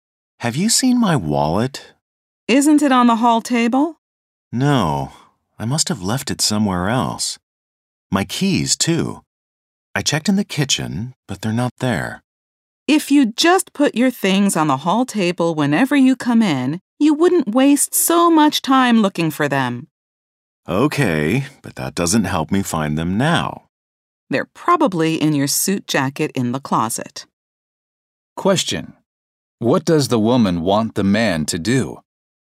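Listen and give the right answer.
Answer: Put his things on the hall table whenever he comes in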